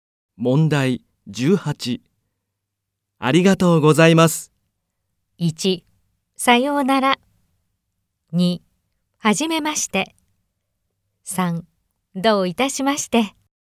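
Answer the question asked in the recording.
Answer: 3: どういたしまして。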